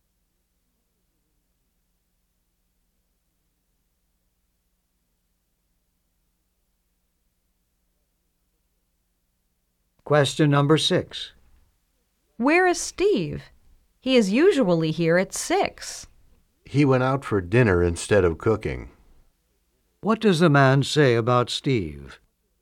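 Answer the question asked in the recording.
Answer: Steve went out to eat dinner.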